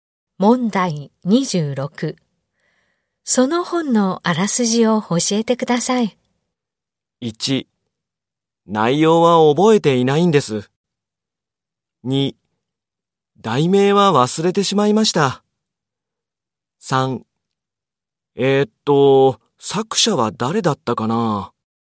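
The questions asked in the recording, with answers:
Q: その本のあらすじを教えてください。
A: 1: 内容は覚えていないんです。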